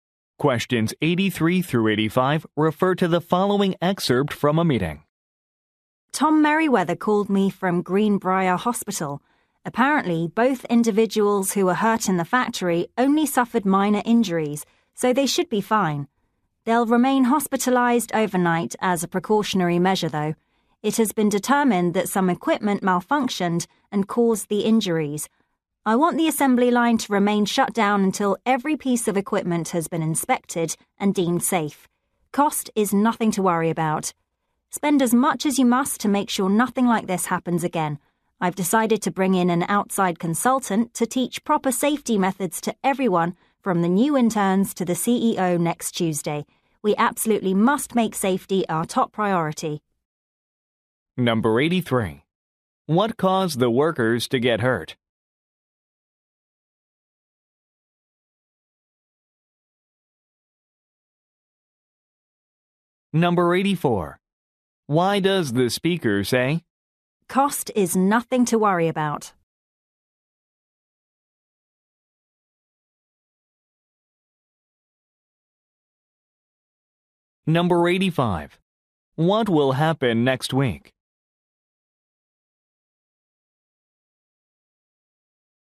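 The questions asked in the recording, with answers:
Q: What caused the workers to get hurt?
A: Equipment malfunction

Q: What will happen next week?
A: A consultant will teach safety methods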